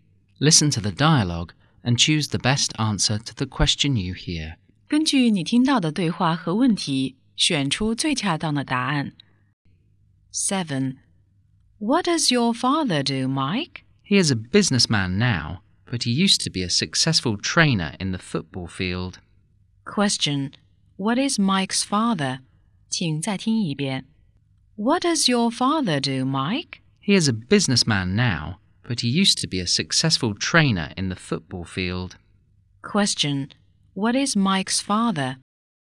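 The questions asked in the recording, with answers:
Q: What is Mike's father?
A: A businessman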